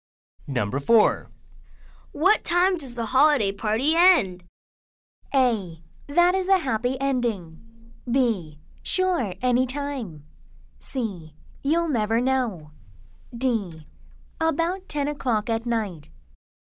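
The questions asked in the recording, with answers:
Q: What time does the holiday party end?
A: D: About 10 o'clock at night.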